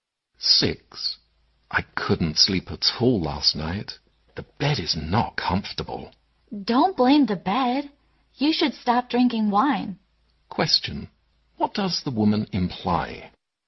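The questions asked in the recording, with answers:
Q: What does the woman imply?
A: Drinking wine kept the man awake, not the bed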